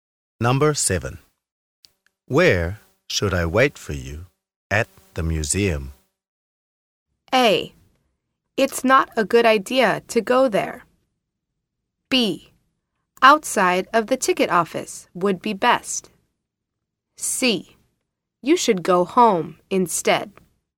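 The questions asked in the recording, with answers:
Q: Where should I wait for you at the museum?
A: B: Outside of the ticket office would be best.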